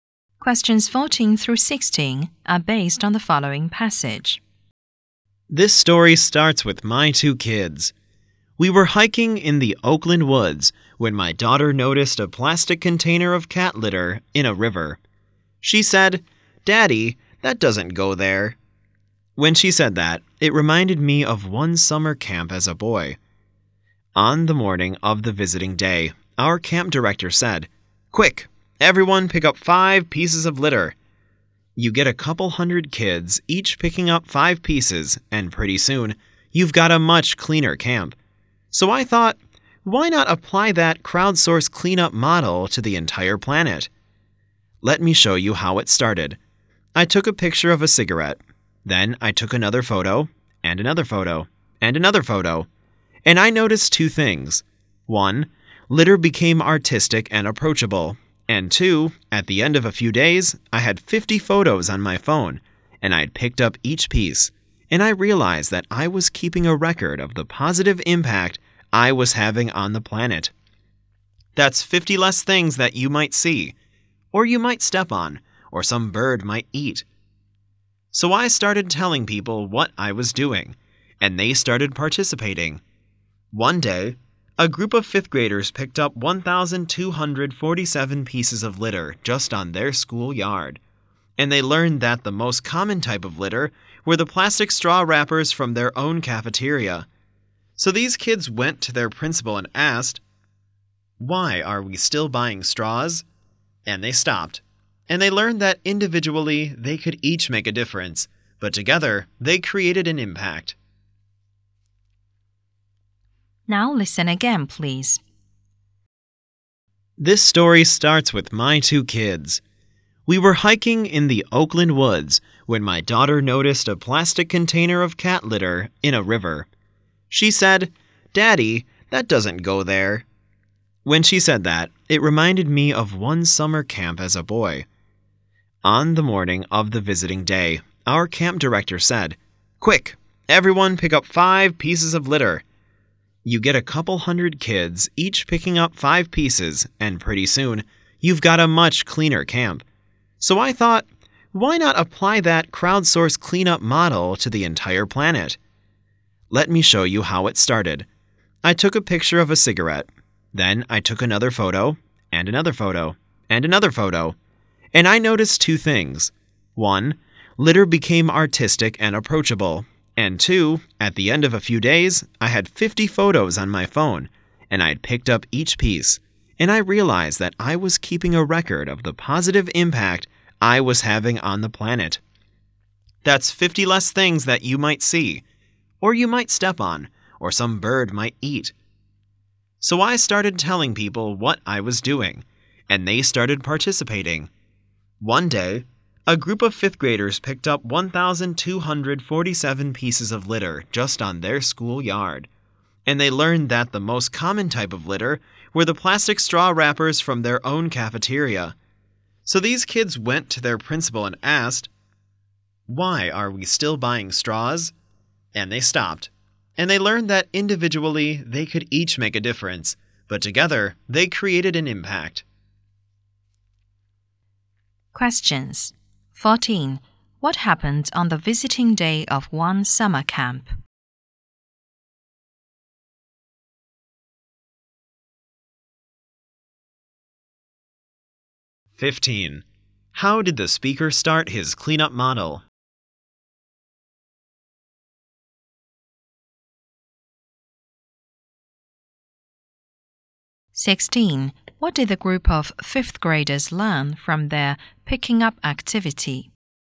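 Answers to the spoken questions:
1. Every camper picked up 5 pieces of litter
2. By photographing pieces of litter and picking them up
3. Individually they could each make a difference, and together they created an impact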